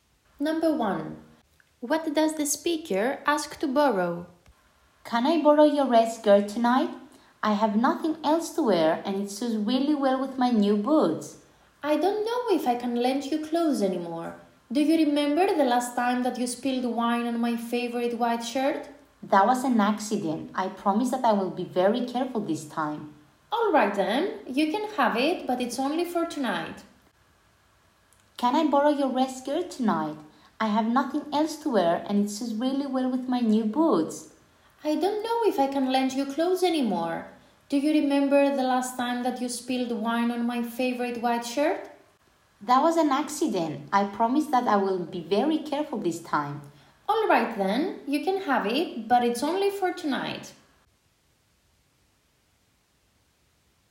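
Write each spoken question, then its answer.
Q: What does the speaker ask to borrow?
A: Her red skirt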